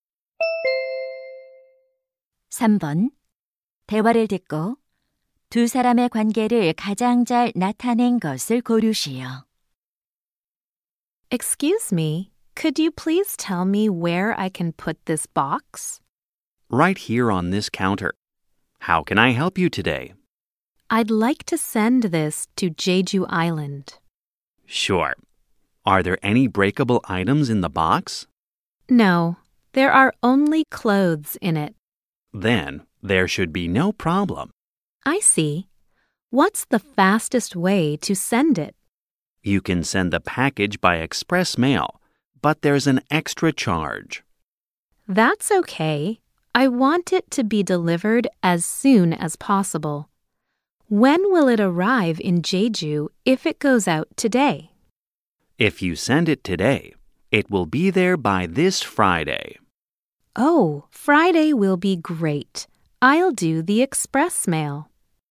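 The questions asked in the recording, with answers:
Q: 대화를 듣고 두 사람의 관계를 가장 잘 나타낸 것을 고르시오.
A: 우체국 직원과 고객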